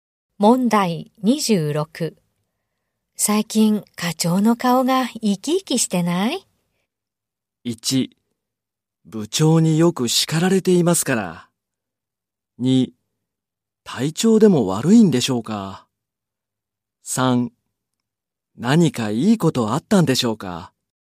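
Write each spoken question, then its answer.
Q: 最近課長の顔が生き生きしてない?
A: 3: 何かいいことあったんでしょうか。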